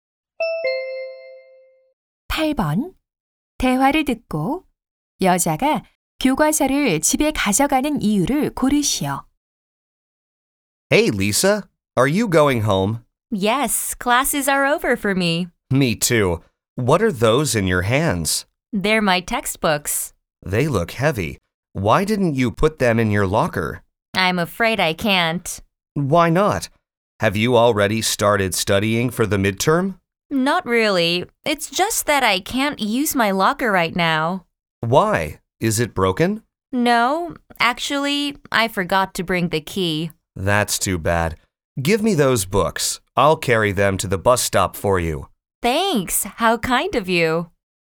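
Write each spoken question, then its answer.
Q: 대화를 듣고 여자가 교과서를 집에 가져가는 이유를 고르시오.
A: 사물함 열쇠를 가져오지 않아서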